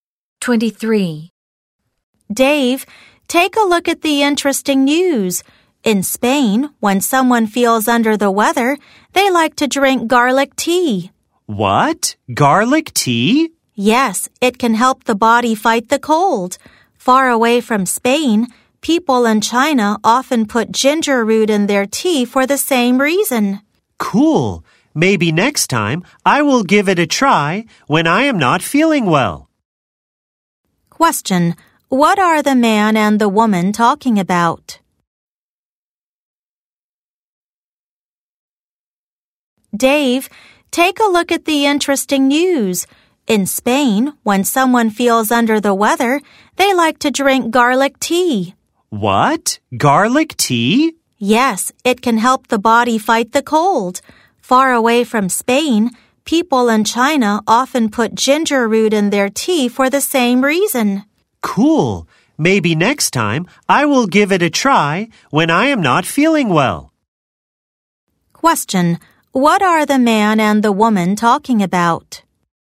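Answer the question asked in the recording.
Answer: Drinks (teas) people have to fight a cold in different countries.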